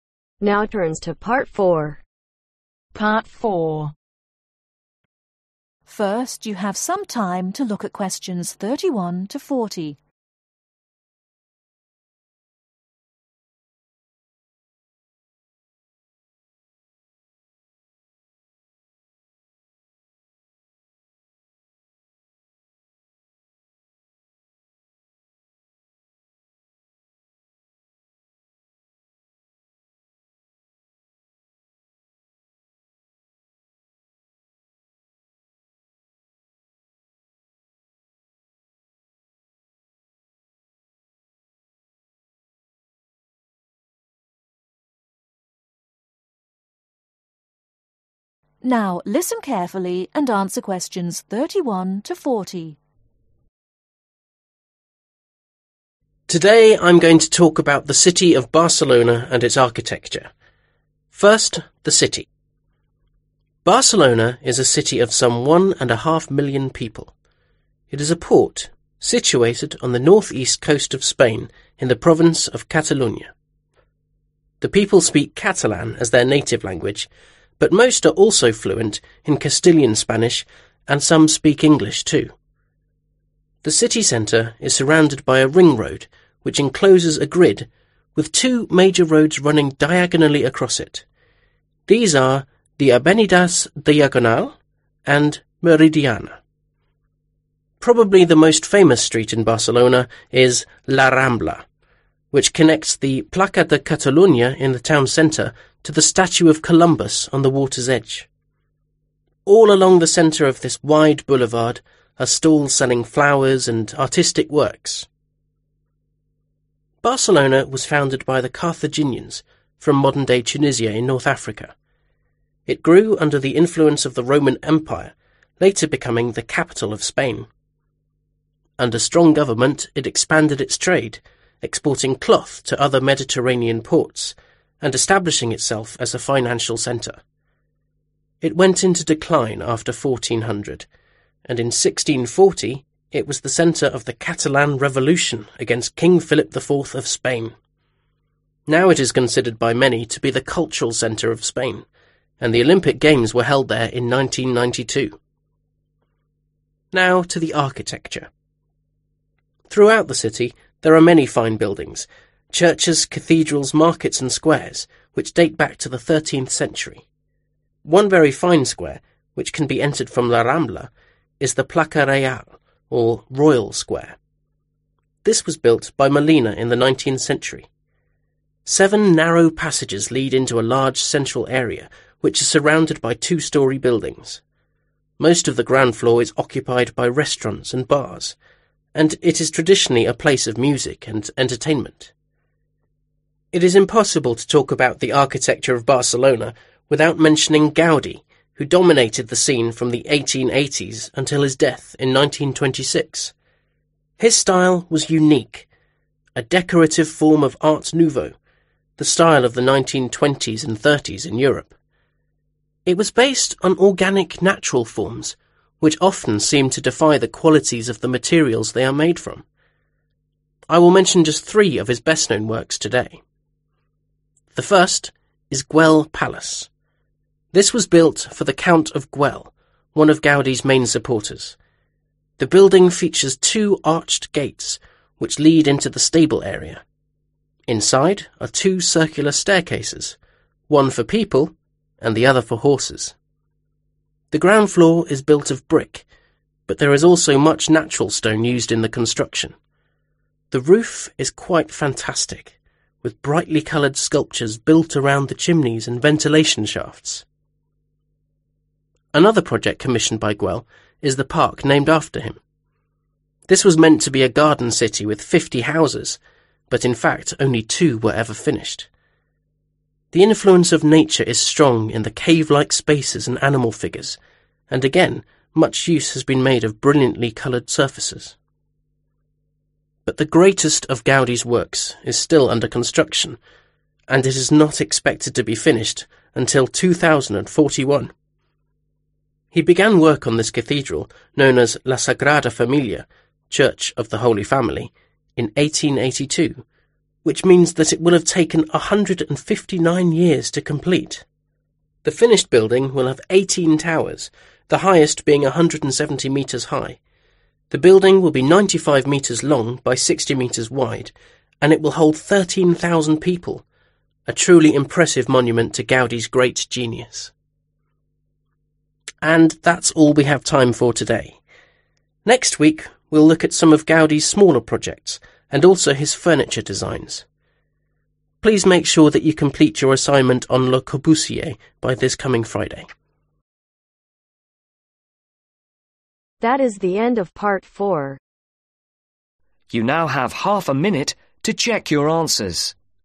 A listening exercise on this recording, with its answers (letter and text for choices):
Circle the correct letter.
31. Most people in Barcelona speak ....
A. one language.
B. two languages.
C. three languages.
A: B. two languages.

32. Avenida Meridiana runs ....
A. diagonally across the city.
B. to the edge to the water.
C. around the city.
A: A. diagonally across the city.

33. The Carthaginians came from ....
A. Rome.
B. Spain.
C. North Africa.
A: C. North Africa.

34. The placa Reial was built in ....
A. 1992.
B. the 19th century.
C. the 13th century.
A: B. the 19th century.

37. The ground floor of Guell Palace is built of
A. brick.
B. marble.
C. mosaic.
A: A. brick.

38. Guell Park has ....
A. two houses.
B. fifty houses.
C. no houses.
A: A. two houses.

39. The completion date for la Sagrada Familia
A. was 1882.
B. will be 2041.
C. was 2004.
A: B. will be 2041.